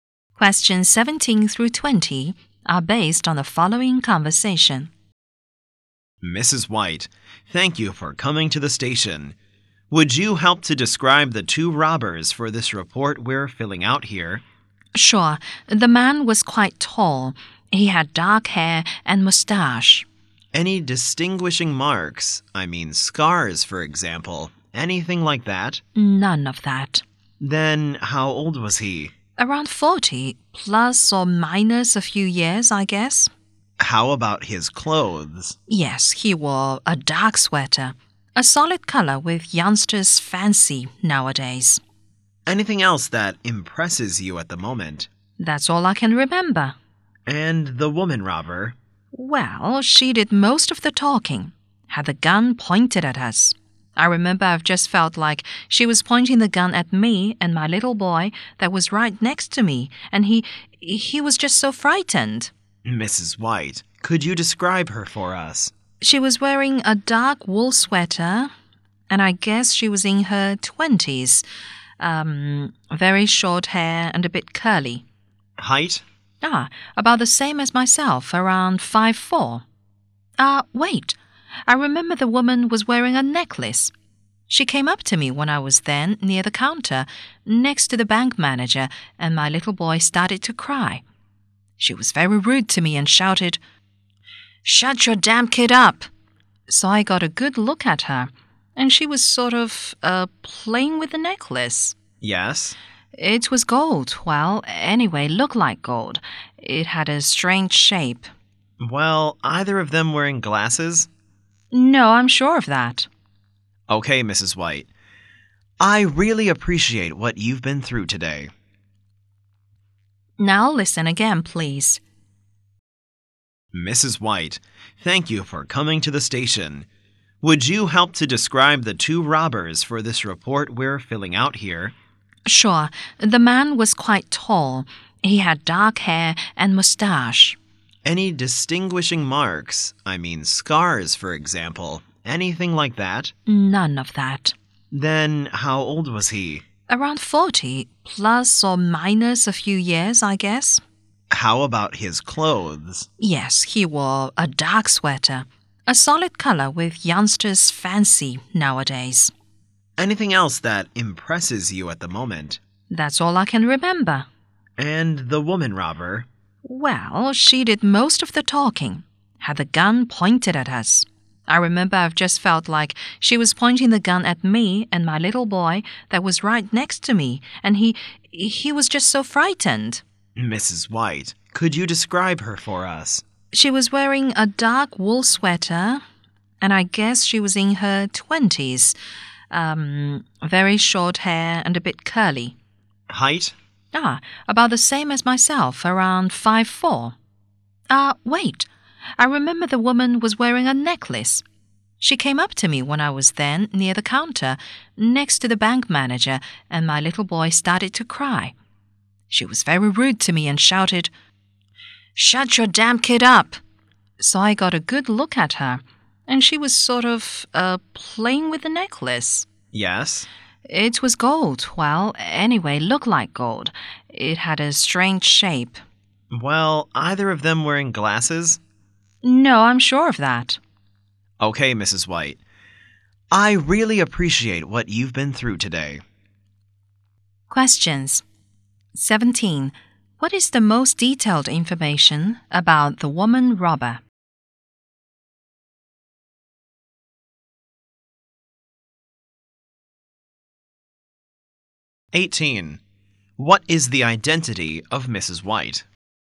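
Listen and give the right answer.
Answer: A witness of the bank robbery.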